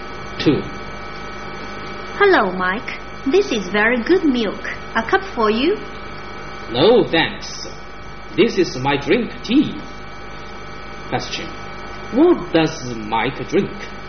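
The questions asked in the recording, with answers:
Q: What does Mike drink?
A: Tea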